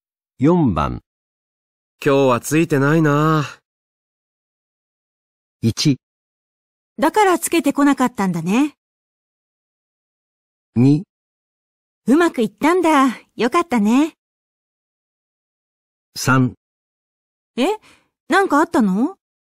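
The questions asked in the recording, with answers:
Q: 今日はついてないなぁ。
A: 3: え?なんかあったの?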